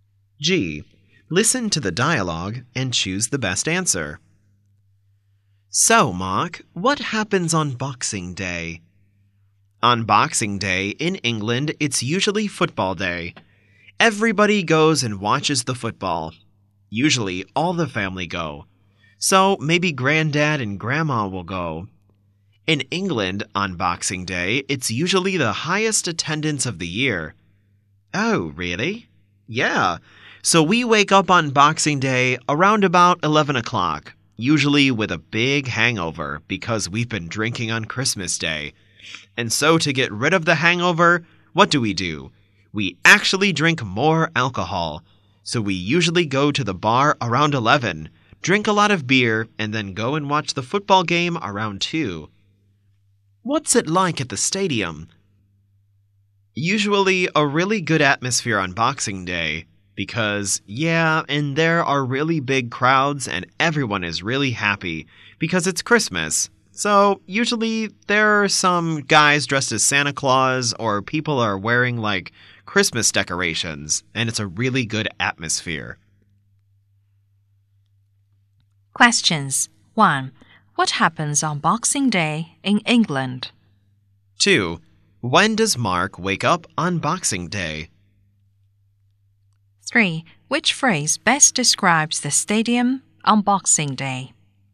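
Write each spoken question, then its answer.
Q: What happens on Boxing Day in England?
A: People go and watch football

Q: When does Mark wake up on Boxing Day?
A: Around 11 o'clock

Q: Which phrase best describes the stadium on Boxing Day?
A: A really good atmosphere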